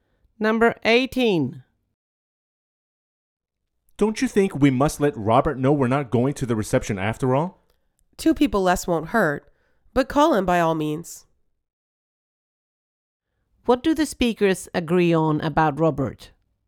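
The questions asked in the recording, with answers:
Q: What do the speakers agree on about Robert?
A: They should call him to tell him they won't attend the reception.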